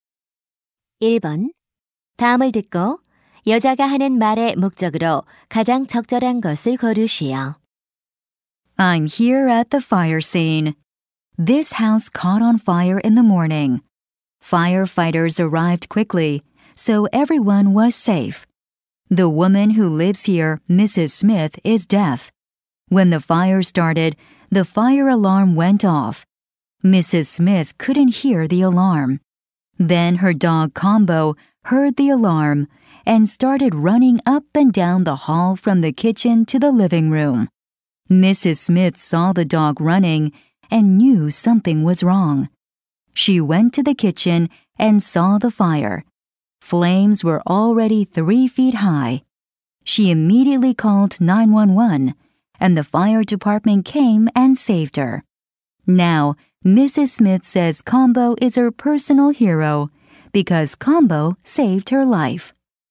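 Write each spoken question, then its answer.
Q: 다음을 듣고 여자가 하는 말의 목적으로 가장 적절한 것을 고르시오.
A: 화재 현장에서 청각장애인을 구한 개 소식을 보도하려고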